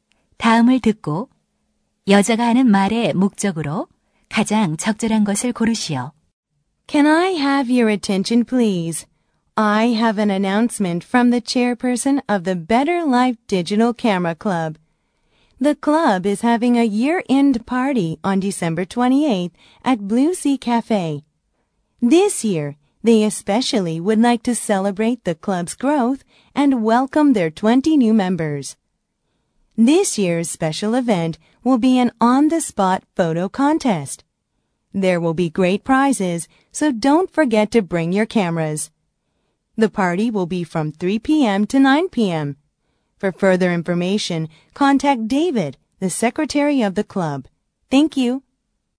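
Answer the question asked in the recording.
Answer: 디지털 카메라 동호회의 연말 파티를 안내하려고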